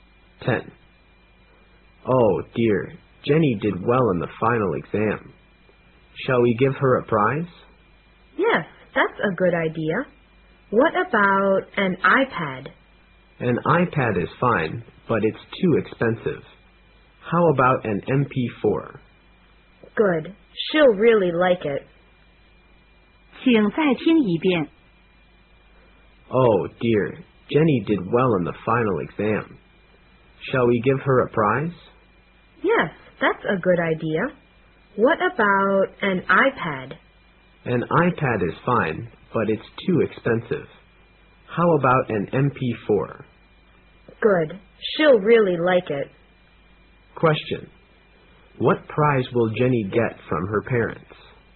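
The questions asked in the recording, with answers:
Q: What prize will Jenny get from her parents?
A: An MP4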